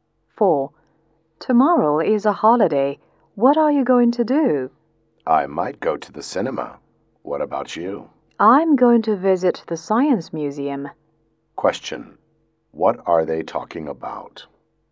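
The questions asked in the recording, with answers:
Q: What are they talking about?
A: Their plans for the holiday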